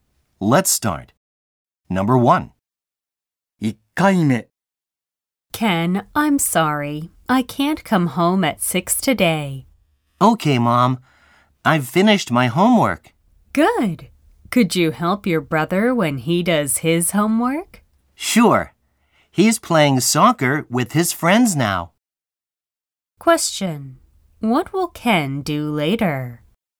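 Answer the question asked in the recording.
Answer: Help his brother with his homework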